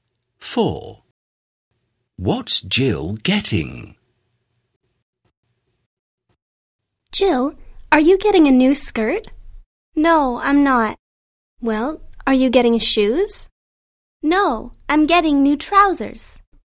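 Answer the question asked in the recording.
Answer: New trousers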